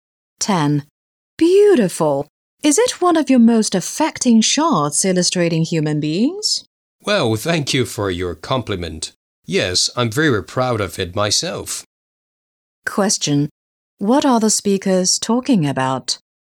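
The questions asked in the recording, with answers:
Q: What are the speakers talking about?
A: A photograph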